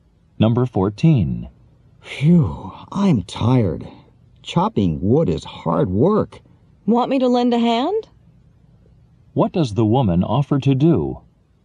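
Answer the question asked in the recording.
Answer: Help the man chop wood.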